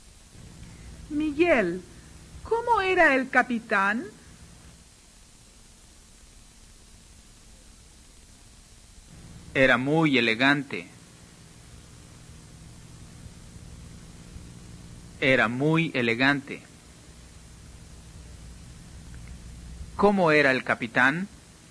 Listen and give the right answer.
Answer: Era muy elegante.